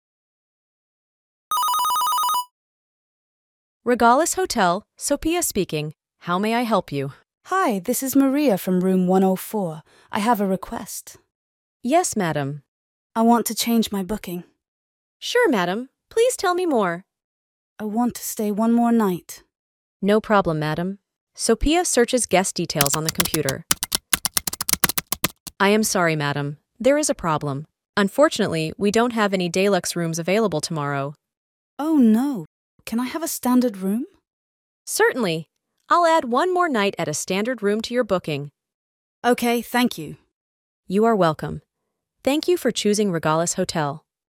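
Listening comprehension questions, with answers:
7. Listening Check: Listen to the audio and answer the question: What does Maria need?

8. Listening Check: Listen to the audio again and answer the question: What is the problem?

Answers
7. She wants to change her booking and stay one more night.
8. There are no deluxe rooms available tomorrow.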